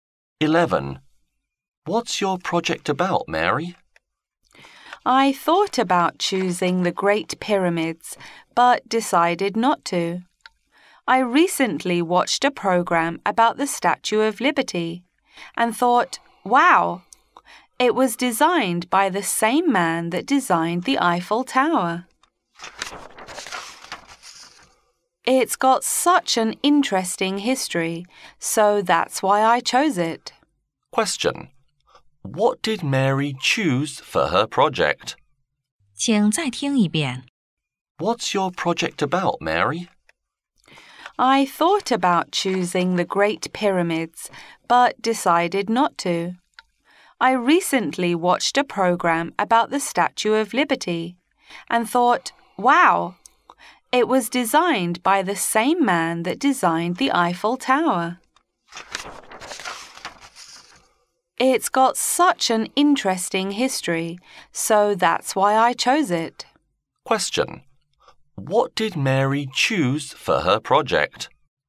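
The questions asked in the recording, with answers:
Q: What did Mary choose for her project?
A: The Statue of Liberty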